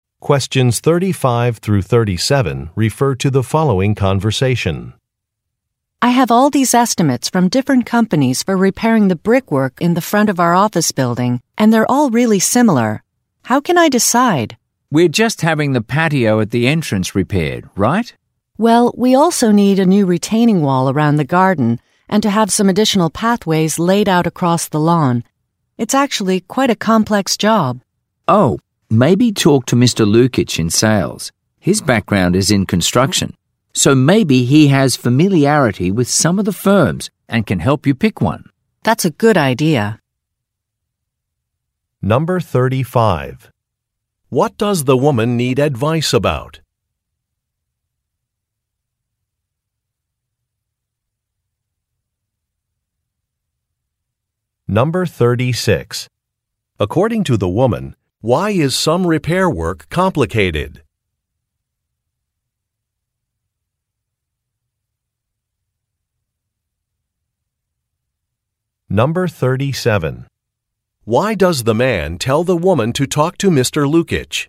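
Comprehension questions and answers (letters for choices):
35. What does the woman need advice about?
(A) Which company to hire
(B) Which materials to use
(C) When to begin some repair work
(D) Where to lay down some paths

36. According to the woman, why is some repair work complicated?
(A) It will take place during the winter.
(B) It is part of a larger job.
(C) It has been postponed.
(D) It requires a special permit.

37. Why does the man tell the woman to talk to Mr. Lukich?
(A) He can perform some construction work.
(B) His sales record is excellent.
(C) His background is relevant to the woman's needs.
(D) He was assigned to the woman's project.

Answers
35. A
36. B
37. C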